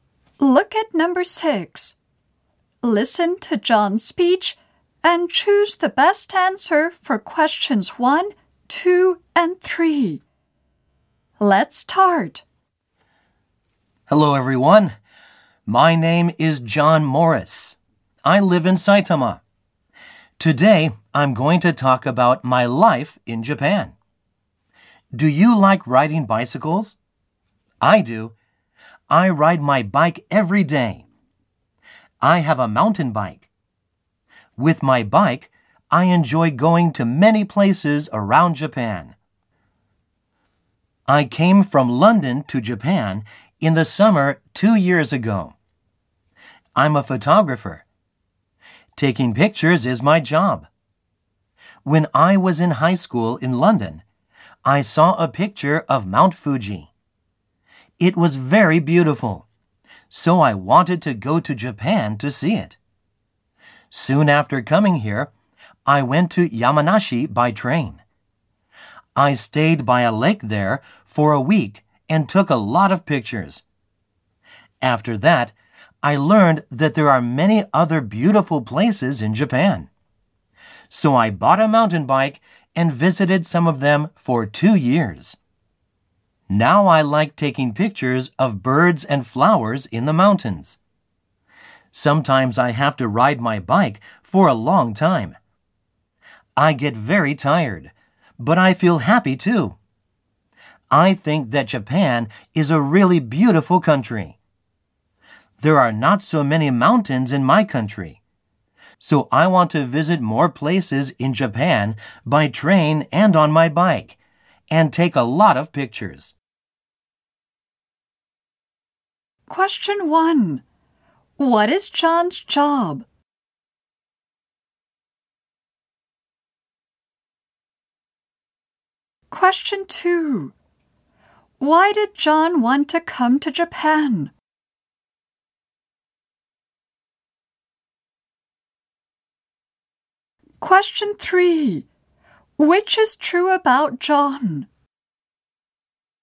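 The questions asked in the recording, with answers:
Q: What is John's job?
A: He is a photographer.

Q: Why did John want to come to Japan?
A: Because he saw a beautiful picture of Mount Fuji and wanted to see it.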